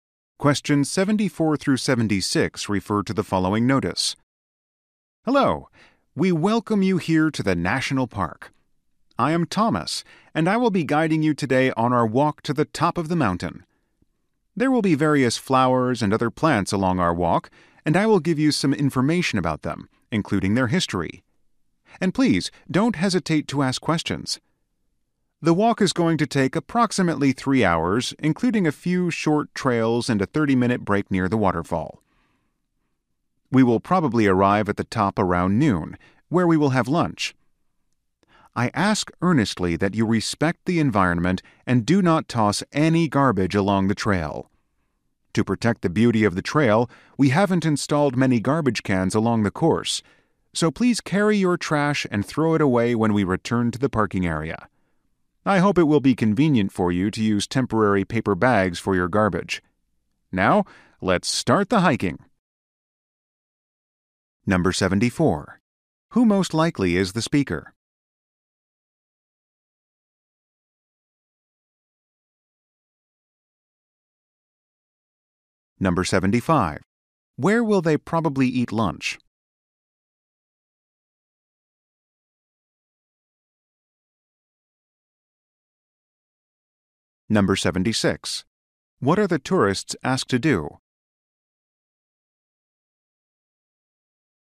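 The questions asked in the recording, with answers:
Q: Who most likely is the speaker?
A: A tour guide

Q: Where will they probably eat lunch?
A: At the top of the mountain

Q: What are the tourists asked to do?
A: Carry their trash and not throw garbage on the trail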